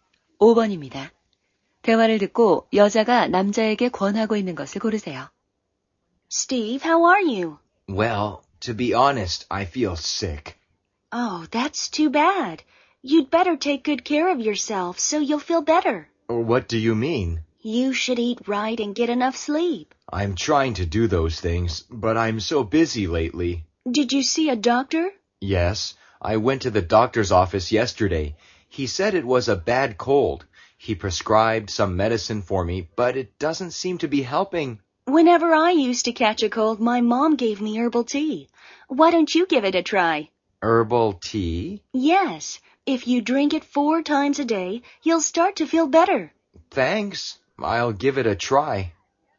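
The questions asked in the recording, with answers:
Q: 대화를 듣고 여자가 남자에게 권하고 있는 것을 고르세요.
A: 허브차 마시기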